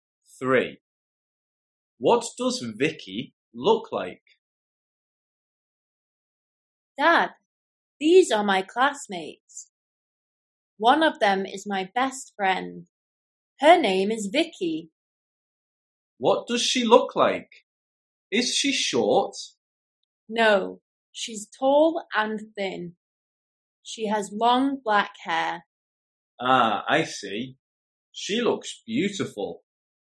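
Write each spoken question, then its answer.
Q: What does Vicky look like?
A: Tall and thin with long black hair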